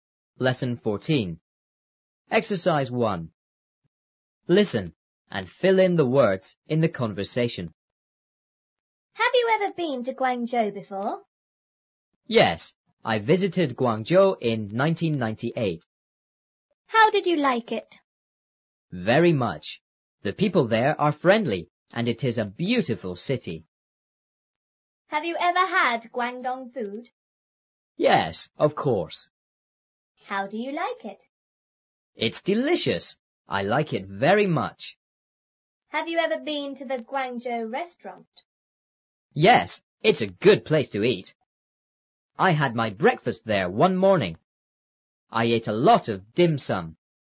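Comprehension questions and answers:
1.Listen and fill in the words in the conversation.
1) A:___you ever___to Guangzhou before.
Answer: Have; been

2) B:Yes,I___Guangzhou in 1998.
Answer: visited

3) A:How___you___it?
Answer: did; like

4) B:Very much.The people there are___and it___a beautiful city.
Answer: friendly; is

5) A:___you ever___Guangdong food?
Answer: Have; had

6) A:How___you like it?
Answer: do

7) B:It's___I like it very much.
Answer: delicious

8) A:___you___been to the Guangzhou Restaurant.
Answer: Have; ever

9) I___my breakfast there one morning.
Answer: had

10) I___a lot of dim sum.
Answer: ate

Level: 初中英语广州版3B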